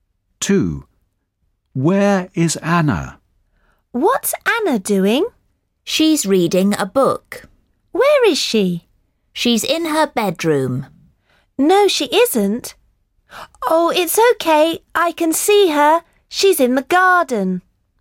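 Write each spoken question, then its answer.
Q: Where is Anna?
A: In the garden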